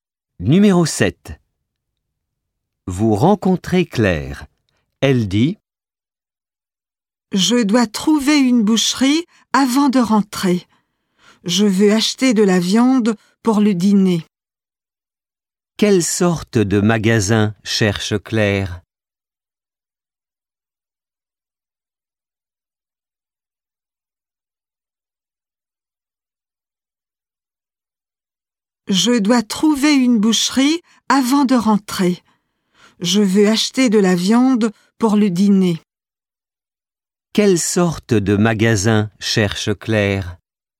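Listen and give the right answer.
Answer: Une boucherie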